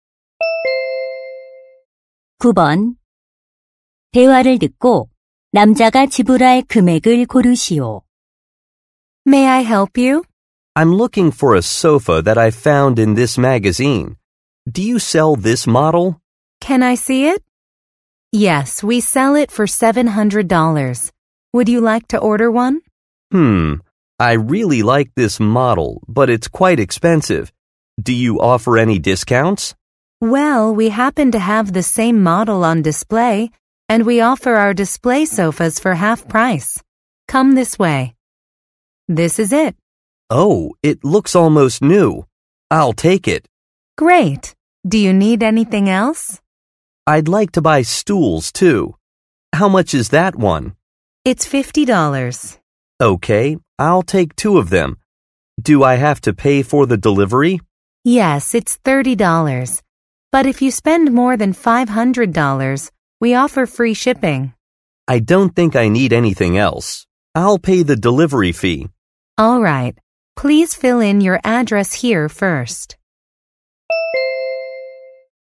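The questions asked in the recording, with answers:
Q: 대화를 듣고 남자가 지불할 금액을 고르시오.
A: $480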